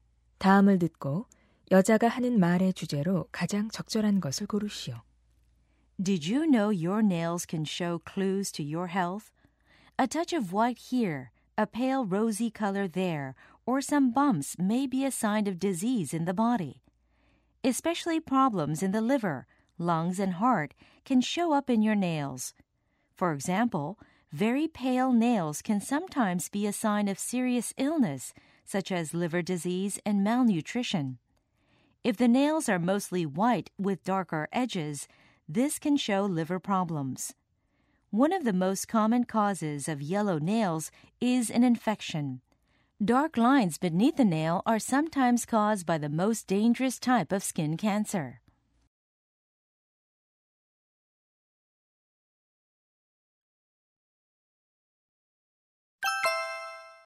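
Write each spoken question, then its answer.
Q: 다음을 듣고 여자가 하는 말의 주제로 가장 적절한 것을 고르시오.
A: 손톱으로 알 수 있는 건강 상태의 징후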